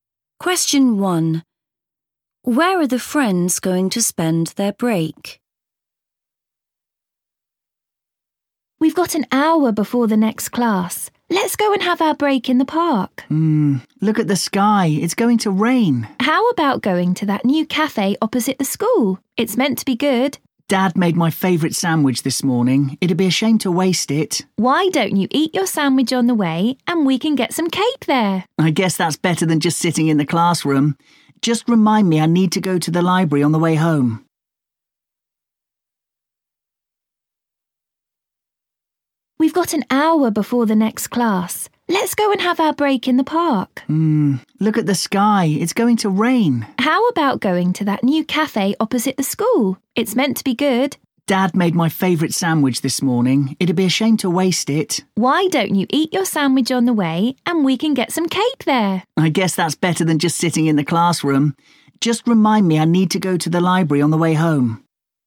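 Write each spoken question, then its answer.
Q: Where are the friends going to spend their break?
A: At the new cafe opposite the school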